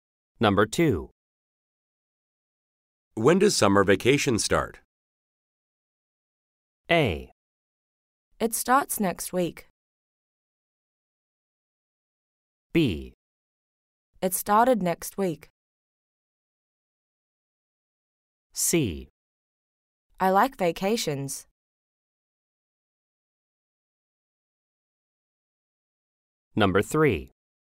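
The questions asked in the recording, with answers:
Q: When does summer vacation start?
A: A: It starts next week.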